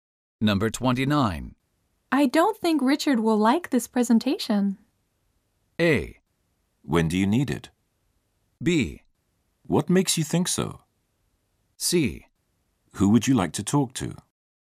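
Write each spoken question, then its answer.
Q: I don't think Richard will like this presentation.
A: B: What makes you think so?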